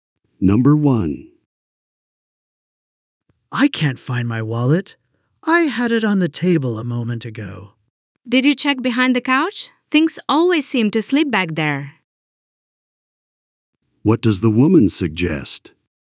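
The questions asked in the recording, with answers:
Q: What does the woman suggest?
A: Checking behind the couch for the wallet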